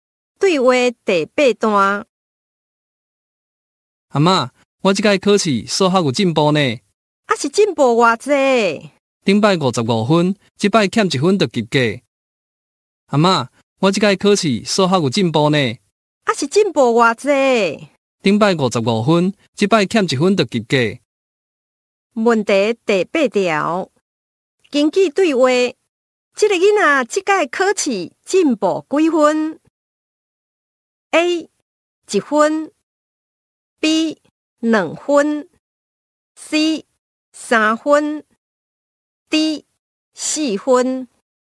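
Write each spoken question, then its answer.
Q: 根据对话,这个囡仔这次考试进步几分 ?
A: D: 四分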